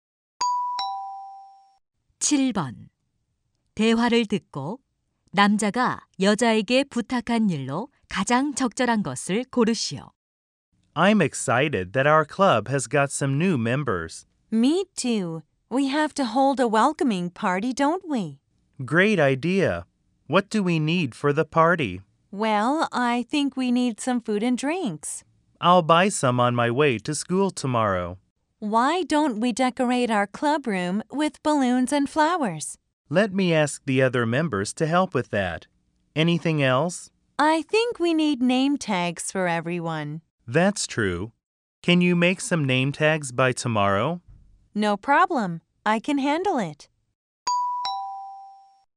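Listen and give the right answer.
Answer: 이름표 만들기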